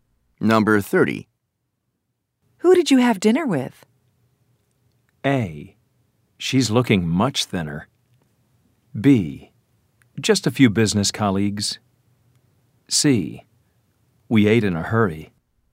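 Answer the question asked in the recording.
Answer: B: Just a few business colleagues.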